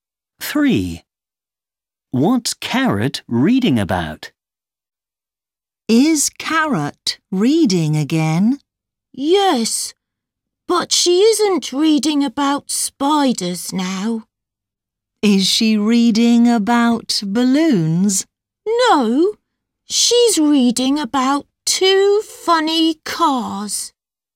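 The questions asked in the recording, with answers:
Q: What's Carrot reading about?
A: Two funny cars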